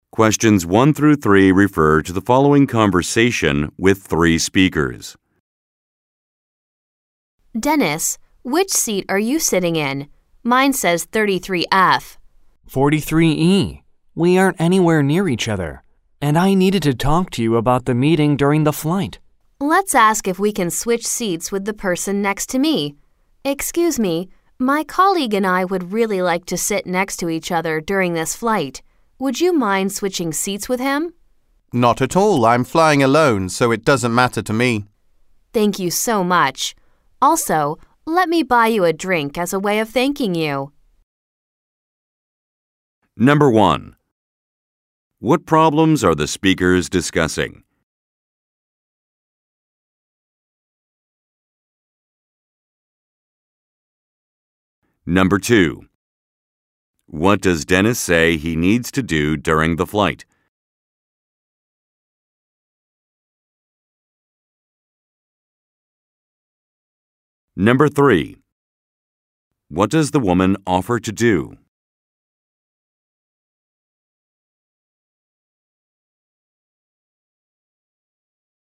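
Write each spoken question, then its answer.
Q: What problems are the speakers discussing?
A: They are not seated near each other on the flight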